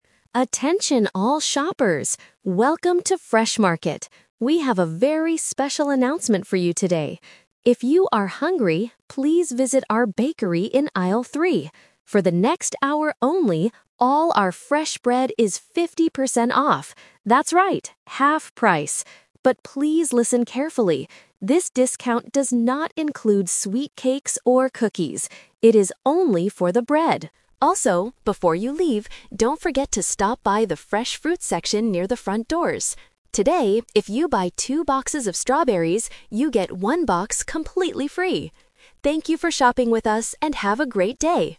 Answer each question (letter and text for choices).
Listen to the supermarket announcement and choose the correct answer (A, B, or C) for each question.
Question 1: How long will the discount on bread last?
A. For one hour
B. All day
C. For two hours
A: A. For one hour

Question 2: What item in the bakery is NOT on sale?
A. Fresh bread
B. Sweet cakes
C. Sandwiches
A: B. Sweet cakes

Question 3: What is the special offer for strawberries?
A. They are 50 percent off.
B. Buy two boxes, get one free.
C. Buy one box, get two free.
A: B. Buy two boxes, get one free.

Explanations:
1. The announcer clearly states, "For the next hour only, all our fresh bread is 50 percent off." Option (C) is the trap; the number "two" is mentioned later when talking about strawberries, not the time limit. Option (B) is a common supermarket promotion but is not true here.
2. The announcer gives a warning: "this discount does not include sweet cakes or cookies." Option (A) is a trap; fresh bread is the item that is on sale. Option (C) is a plausible food item but is never mentioned in the audio.
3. At the end of the announcement, the speaker says, "if you buy two boxes of strawberries, you get one box completely free!" Option (A) is a trap; the 50 percent off discount is for the bread, not the strawberries. Option (C) is a trap using the correct numbers but in the wrong order.

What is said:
Announcer: Attention all shoppers! Welcome to Fresh Market. We have a very special announcement for you today. If you are hungry, please visit our bakery in aisle three. For the next hour only, all our fresh bread is 50 percent off. That's right, half price! But please listen carefully: this discount does not include sweet cakes or cookies. It is only for the bread. Also, before you leave, don't forget to stop by the fresh fruit section near the front doors. Today, if you buy two boxes of strawberries, you get one box completely free! Thank you for shopping with us, and have a great day.

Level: A2